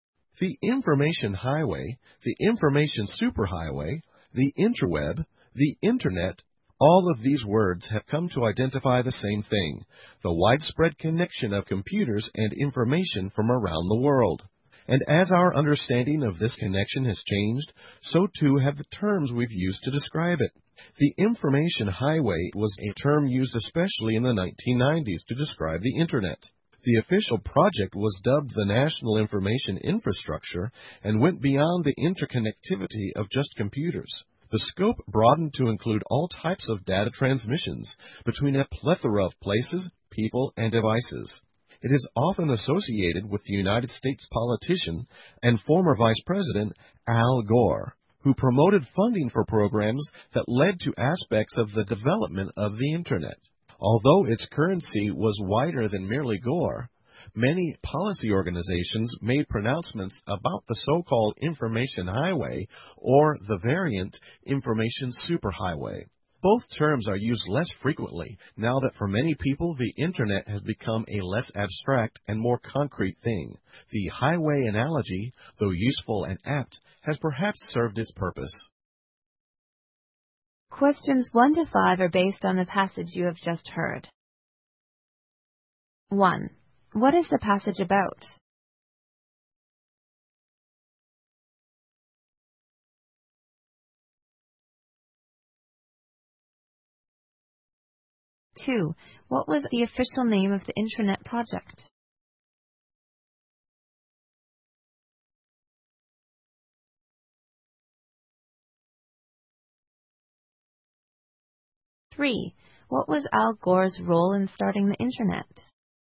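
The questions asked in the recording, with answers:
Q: What is the passage about?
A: The term "information highway" used to describe the Internet

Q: What was the official name of the Intranet project?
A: The National Information Infrastructure

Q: What was Al Gore's role in starting the Intranet?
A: He promoted funding for programs that led to its development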